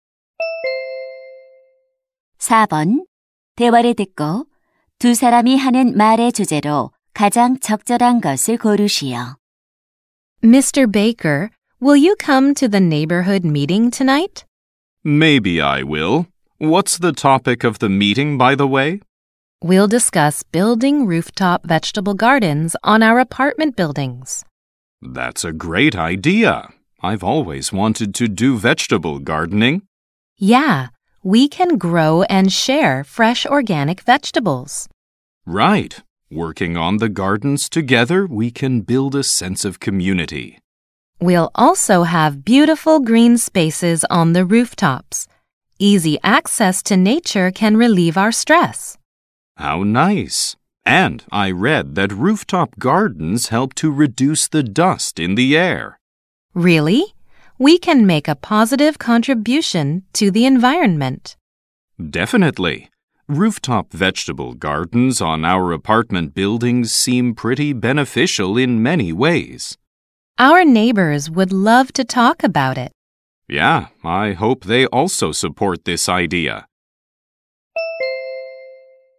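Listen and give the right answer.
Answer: 아파트 옥상 텃밭의 이점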